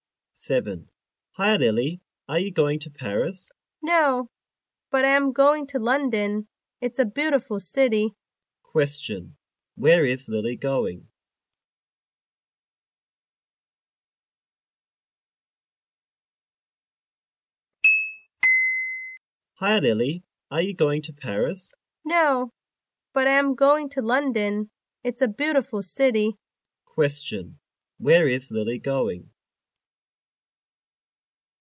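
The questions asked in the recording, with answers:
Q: Question, where is Lily going?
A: To London.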